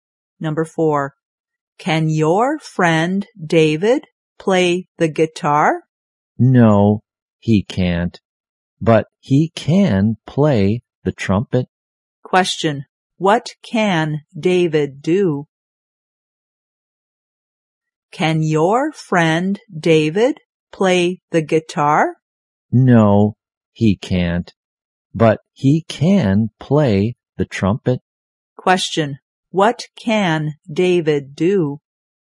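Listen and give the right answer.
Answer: Play the trumpet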